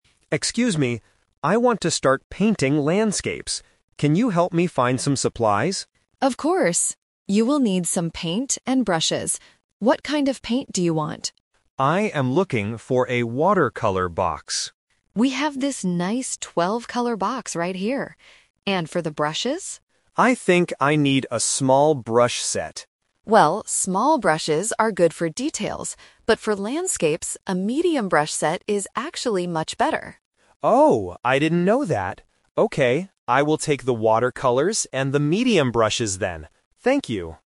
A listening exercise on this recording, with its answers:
Listen to a conversation between a customer and a shop assistant. Choose the correct answer (A, B, or C).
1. What does the man want to paint?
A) Animals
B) Landscapes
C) People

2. What kind of paint is the man looking for?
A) Watercolors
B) Oil paints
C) Wall paints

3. Which brush set does the man finally buy?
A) A small brush set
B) A medium brush set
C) A large brush set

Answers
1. B
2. A
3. B

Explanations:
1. Leo states his goal clearly at the beginning: "I want to start painting landscapes."
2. When Emma asks what kind of paint he wants, Leo answers: "I am looking for a watercolor box."
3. Leo agrees to buy what Emma suggests: "Okay, I will take the watercolors and the medium brushes then."

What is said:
Leo: Excuse me. I want to start painting landscapes. Can you help me find some supplies?
Emma: Of course! You will need some paint and brushes. What kind of paint do you want?
Leo: I am looking for a watercolor box.
Emma: We have this nice 12-color box right here. And for the brushes?
Leo: I think I need a small brush set.
Emma: Well, small brushes are good for details. But for landscapes, a medium brush set is actually much better.
Leo: Oh, I didn't know that. Okay, I will take the watercolors and the medium brushes then. Thank you!

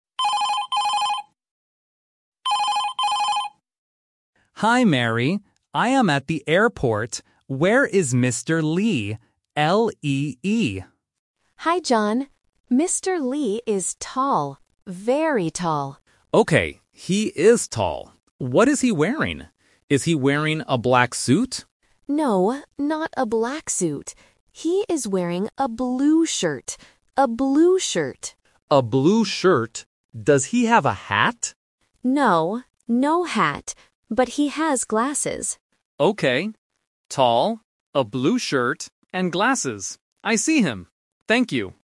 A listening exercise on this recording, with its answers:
Listen to the telephone conversation between a driver and his colleague. Choose the correct answer (A, B, or C) for each question.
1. Who is the driver looking for at the airport?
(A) Mr. Lee.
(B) Mr. Bee.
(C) Mr. Smith.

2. What is the man wearing?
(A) A black suit.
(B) A blue shirt.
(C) A white shirt.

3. What accessory does the man have?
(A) A hat.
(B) A bag.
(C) Glasses.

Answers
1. A
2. B
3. C

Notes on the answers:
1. John clearly says, "Where is Mr. Lee?" and spells the name: "L-E-E." Option B (Mr. Bee) is the trap because "Lee" and "Bee" sound very similar, testing the A1 learner's phonetic listening skill. Option C is not mentioned.
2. Mary tells John, "He is wearing a blue shirt." Option A (A black suit) is the trap because John asks about it first, but Mary says "No, not a black suit." Option C is not mentioned.
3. Mary explicitly states, "But he has glasses." Option A (A hat) is the trap because John asks if he has a hat, and Mary says "No, no hat." Option B is a plausible airport item but is not mentioned in the audio.

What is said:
John: Hi, Mary. I am at the airport. Where is Mr. Lee? L-E-E.
Mary: Hi, John. Mr. Lee is tall. Very tall.
John: Okay, he is tall. What is he wearing? Is he wearing a black suit?
Mary: No, not a black suit. He is wearing a blue shirt. A blue shirt.
John: A blue shirt. Does he have a hat?
Mary: No, no hat. But he has glasses.
John: Okay. Tall, a blue shirt, and glasses. I see him! Thank you.

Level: A1

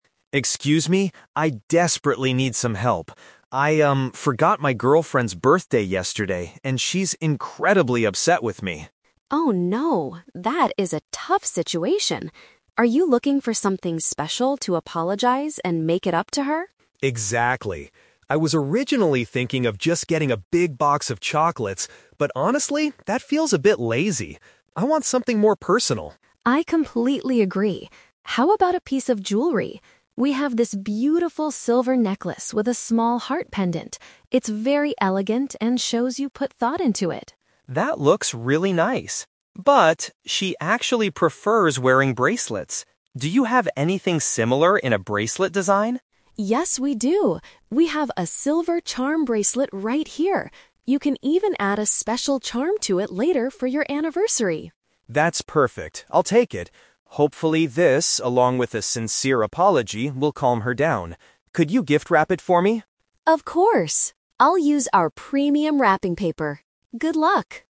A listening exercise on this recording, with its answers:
Listen to a conversation between a customer and a shop assistant. Choose the best answer (A, B, or C) for each question.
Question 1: Why is the customer's partner angry with him?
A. He bought her the wrong piece of jewelry.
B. He failed to remember her special day.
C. He arrived late for their anniversary dinner.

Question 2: Why does the man decide NOT to buy chocolates?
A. He believes it shows a lack of effort.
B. His girlfriend is on a strict healthy diet.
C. They are too expensive for his current budget.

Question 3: What item does the customer finally purchase?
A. A silver necklace with a heart shape.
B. A premium box of sweet treats.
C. A silver ornament worn around the wrist.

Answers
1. B
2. A
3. C

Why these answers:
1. The customer states that he "forgot my girlfriend's birthday yesterday." Paraphrasing: forgot = failed to remember; birthday = special day.
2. The man says buying chocolates "feels a bit lazy" and he wants "something more personal." Paraphrasing: lazy = a lack of effort.
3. The customer decides to buy the "silver charm bracelet" because his girlfriend prefers bracelets. An ornament worn around the wrist is a paraphrase for a bracelet.

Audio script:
Customer: Excuse me, I desperately need some help. I, um, forgot my girlfriend's birthday yesterday, and she's incredibly upset with me.
Assistant: Oh no, that is a tough situation! Are you looking for something special to apologize and make it up to her?
Customer: Exactly. I was originally thinking of just getting a big box of chocolates, but honestly, that feels a bit lazy. I want something more personal.
Assistant: I completely agree. How about a piece of jewelry? We have this beautiful silver necklace with a small heart pendant. It's very elegant and shows you put thought into it.
Customer: That looks really nice. But... she actually prefers wearing bracelets. Do you have anything similar in a bracelet design?
Assistant: Yes, we do! We have a silver charm bracelet right here. You can even add a special charm to it later for your anniversary.
Customer: That's perfect. I'll take it. Hopefully, this, along with a sincere apology, will calm her down. Could you gift-wrap it for me?

